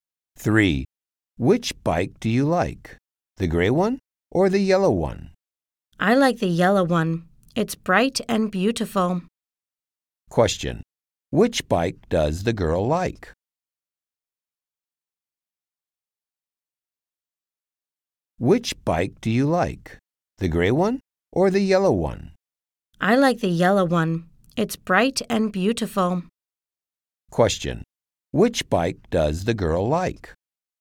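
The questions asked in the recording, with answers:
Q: Which bike does the girl like?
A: The yellow one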